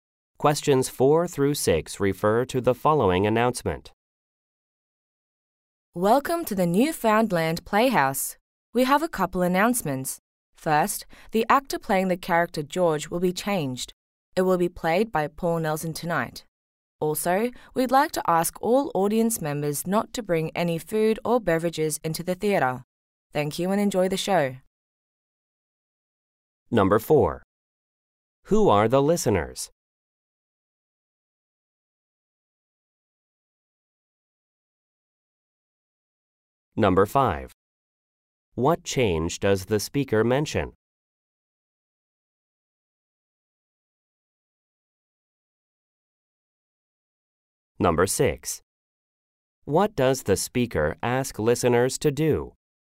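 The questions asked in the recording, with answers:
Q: Who are the listeners?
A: A theatre audience

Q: What change does the speaker mention?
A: A different actor (Paul Nelson) will play George

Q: What does the speaker ask listeners to do?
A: Not bring food or beverages into the theatre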